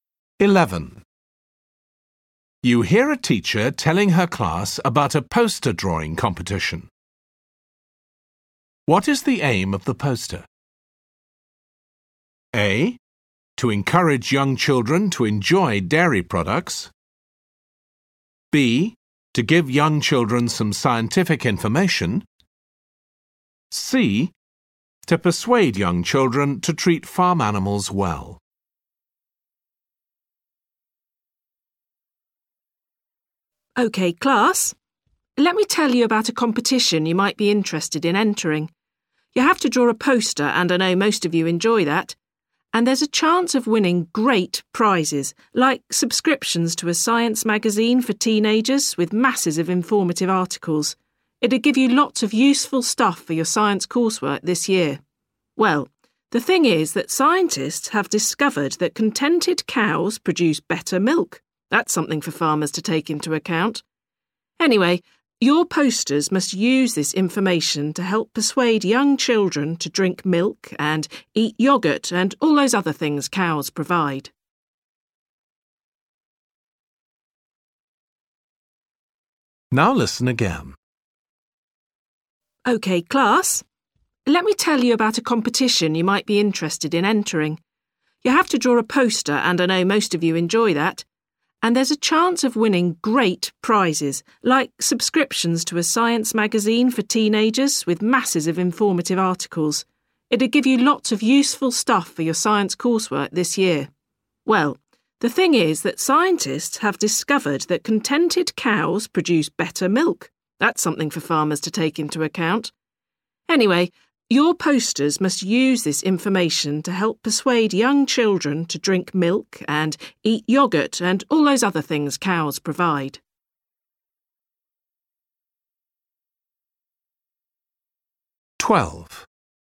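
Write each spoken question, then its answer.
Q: What is the aim of the poster?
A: A: To encourage young children to enjoy dairy products.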